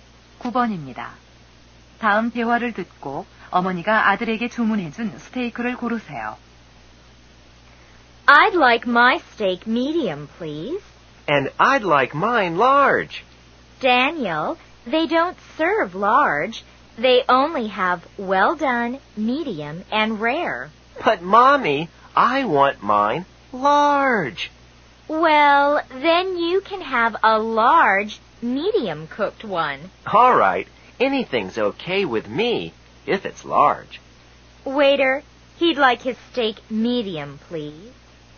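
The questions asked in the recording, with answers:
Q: 다음 대화를 듣고 어머니가 아들에게 주문해준 스테이크를 고르세요.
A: 미디엄으로 익힌 큰 스테이크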